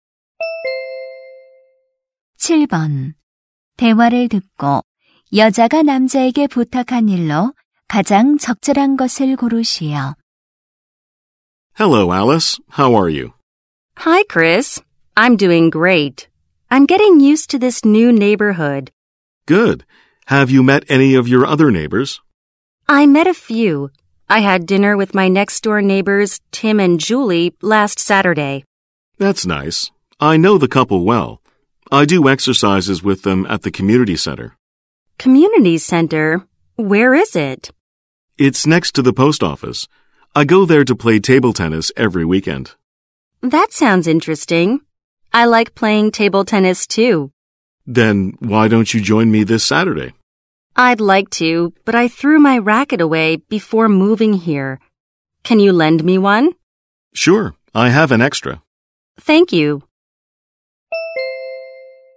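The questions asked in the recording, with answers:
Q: 대화를 듣고 여자가 남자에게 부탁한 일로 가장 적절한 것을 고르시오.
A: 탁구 라켓 빌려주기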